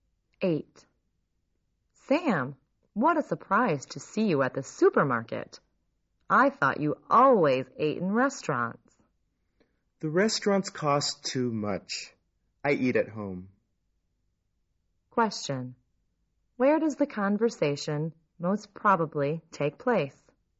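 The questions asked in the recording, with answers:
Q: Where does the conversation most probably take place?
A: At a supermarket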